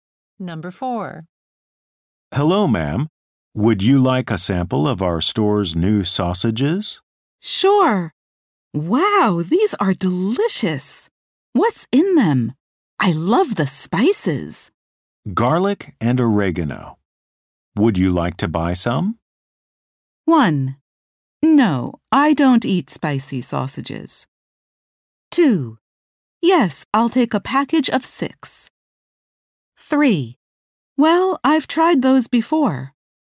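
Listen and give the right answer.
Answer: 2: Yes, I'll take a package of 6.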